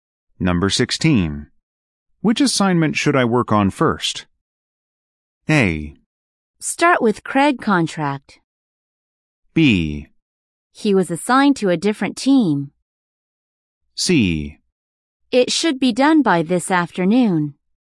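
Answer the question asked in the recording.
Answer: A: Start with Craig contract.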